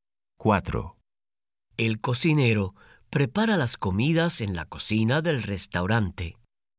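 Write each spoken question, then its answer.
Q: El cocinero prepara las comidas en la cocina del restaurante.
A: Sí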